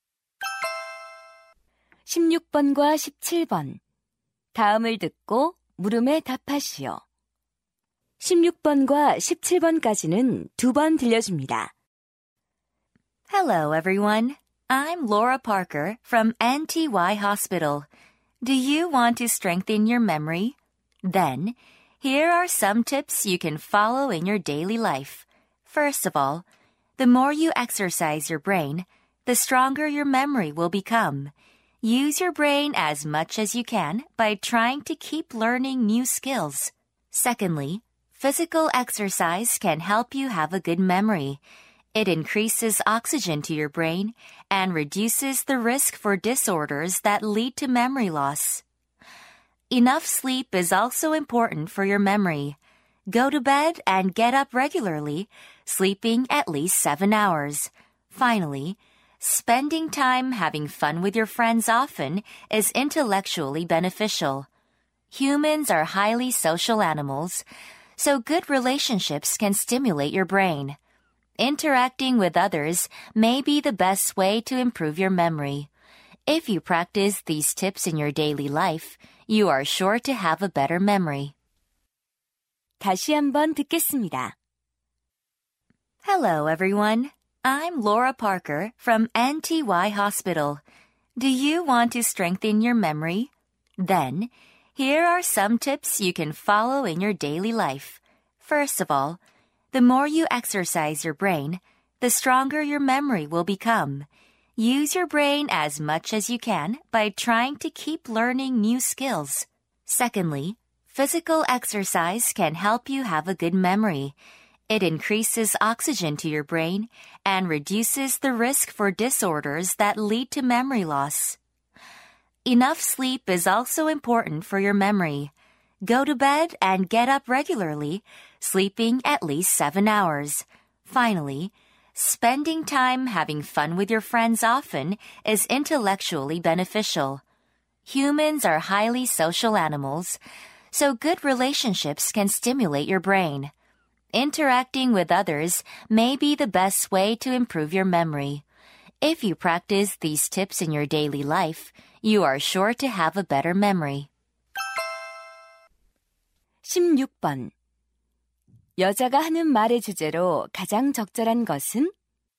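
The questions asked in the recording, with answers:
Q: 여자가 하는 말의 주제로 가장 적절한 것은?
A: 기억력을 향상시키는 방법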